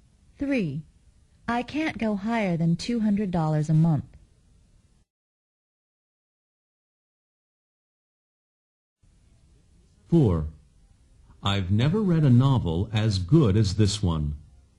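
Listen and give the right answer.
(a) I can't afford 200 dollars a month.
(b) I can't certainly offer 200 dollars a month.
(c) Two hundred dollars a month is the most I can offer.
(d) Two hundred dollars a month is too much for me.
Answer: (c) Two hundred dollars a month is the most I can offer.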